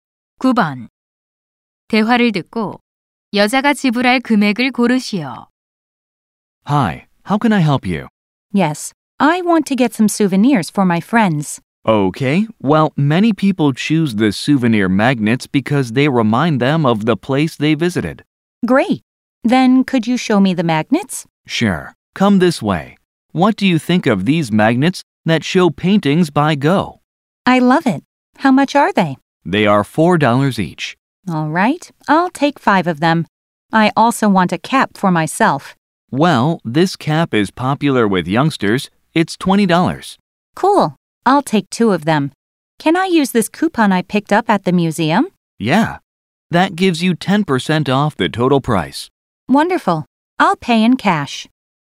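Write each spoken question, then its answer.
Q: 대화를 듣고 여자가 지불할 금액을 고르시오.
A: $54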